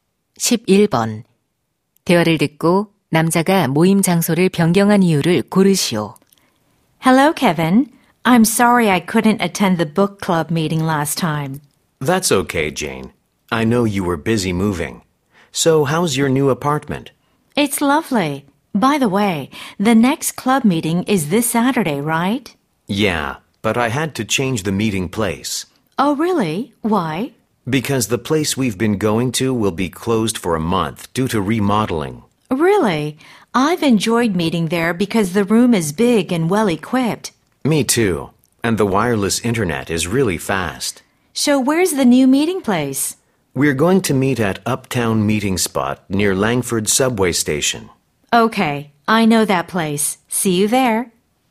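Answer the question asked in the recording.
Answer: 기존 장소가 리모델링으로 한 달간 문을 닫아서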